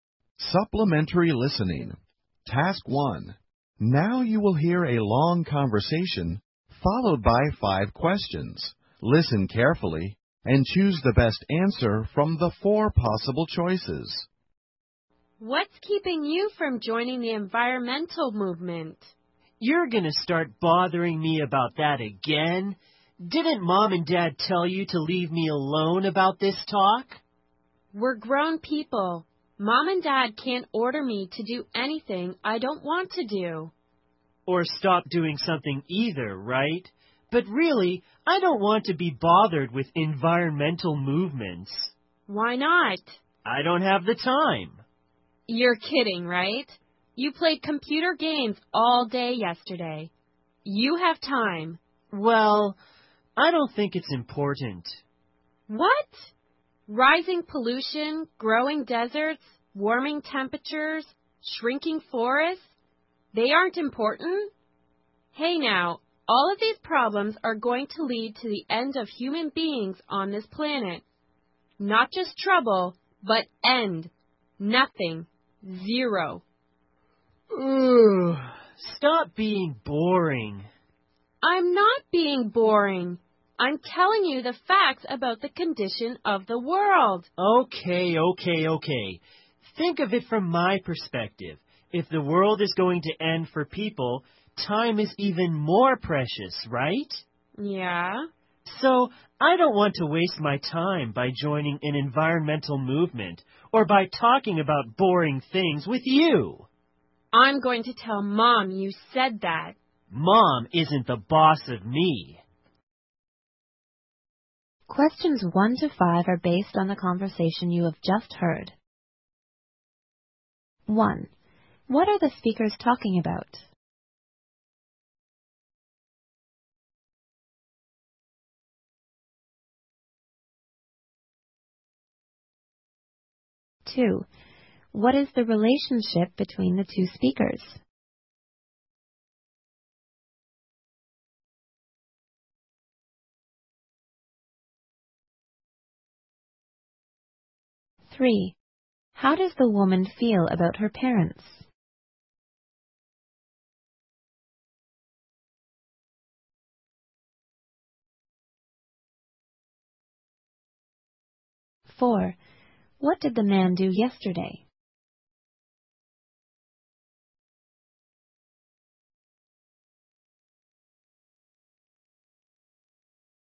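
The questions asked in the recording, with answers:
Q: What are the speakers talking about?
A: Joining the environmental movement

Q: What is the relationship between the two speakers?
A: Brother and sister

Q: What did the man do yesterday?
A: Played computer games all day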